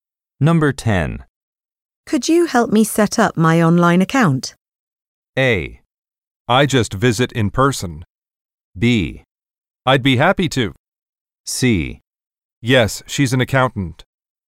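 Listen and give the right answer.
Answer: B: I'd be happy to.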